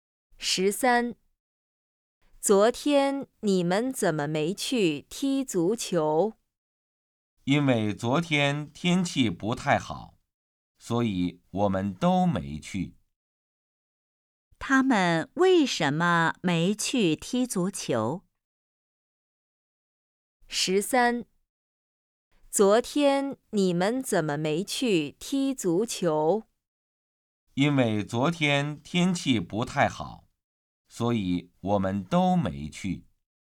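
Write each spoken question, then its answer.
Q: 他们为什么没去踢足球?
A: 昨天天气不太好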